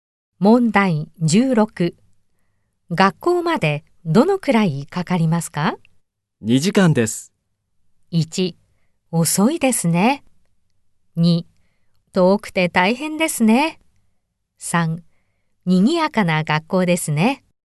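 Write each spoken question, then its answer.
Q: 学校までどのくらいかかりますか?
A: 2: 遠くて大変ですね。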